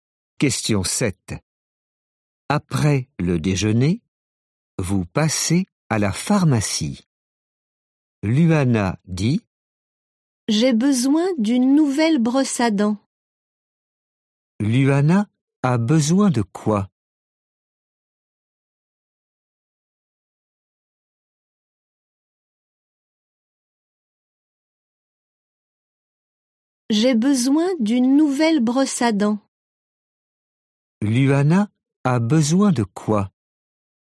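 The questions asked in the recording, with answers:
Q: Luana a besoin de quoi ?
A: D'une brosse à dents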